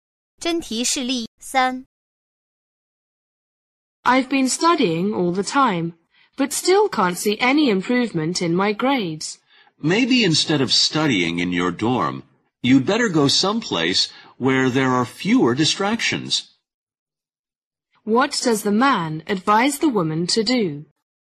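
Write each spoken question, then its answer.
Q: What does the man advise the woman to do?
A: Study somewhere with fewer distractions than her dorm.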